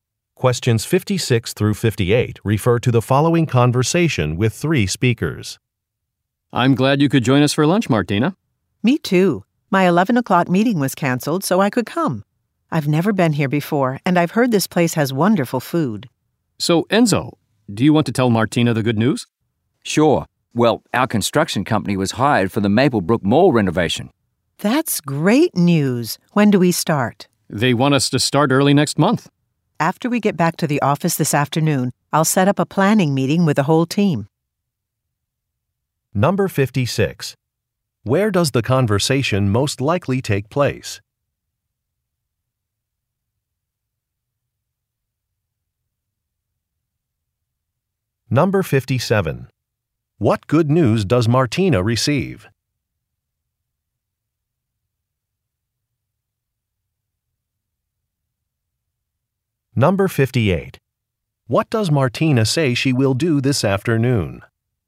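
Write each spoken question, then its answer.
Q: Where does the conversation most likely take place?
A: At a restaurant

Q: What good news does Martina receive?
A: Their company was hired for a mall renovation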